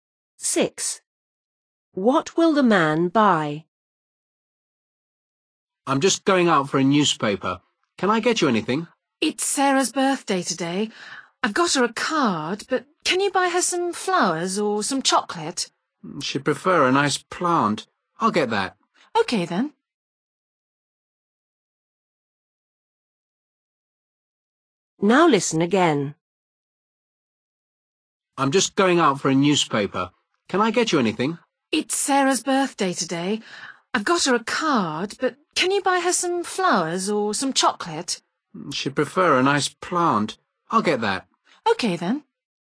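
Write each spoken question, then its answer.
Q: What will the man buy?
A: A plant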